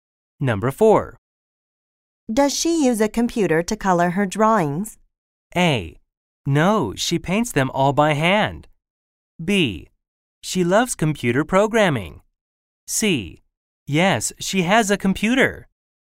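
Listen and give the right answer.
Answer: A: No, she paints them all by hand.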